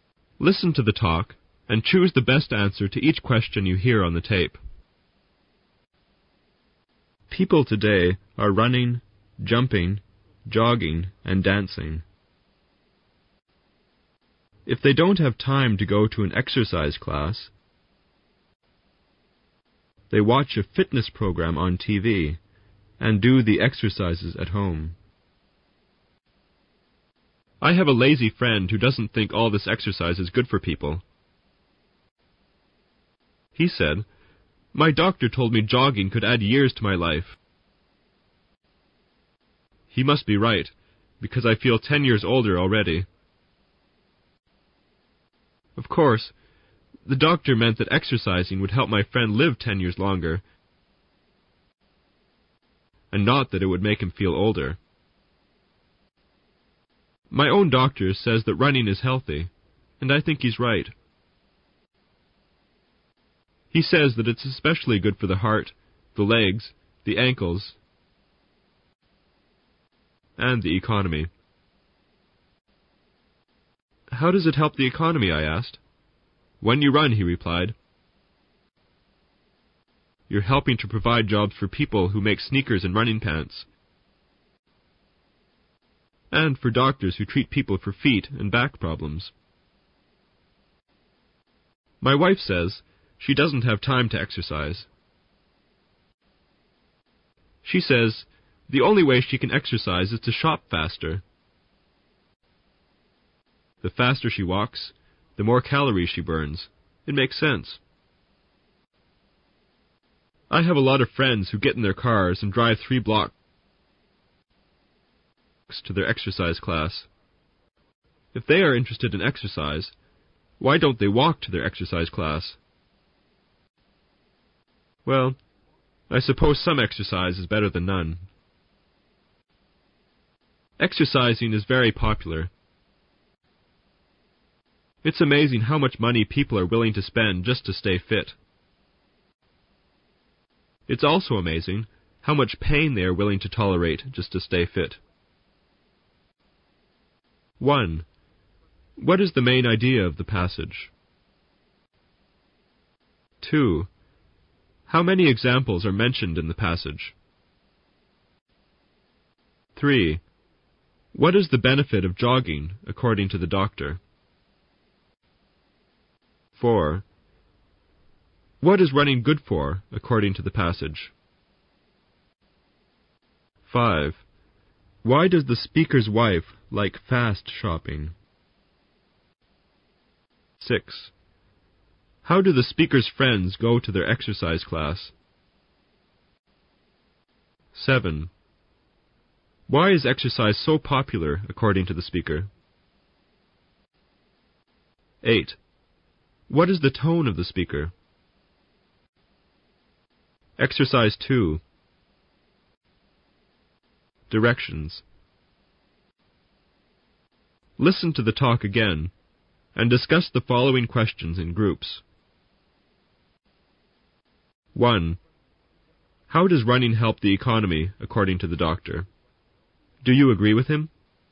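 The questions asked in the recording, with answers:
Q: How does running help the economy, according to the doctor?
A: It provides jobs for people who make sneakers and running pants and for doctors who treat foot and back problems.

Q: What is the benefit of jogging, according to the doctor?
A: It could add years to your life (help you live longer).

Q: What is running good for, according to the passage?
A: The heart, the legs, the ankles, and the economy.

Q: Why does the speaker's wife like fast shopping?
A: It is her only way to exercise; the faster she walks, the more calories she burns.

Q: How do the speaker's friends go to their exercise class?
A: They drive their cars three blocks.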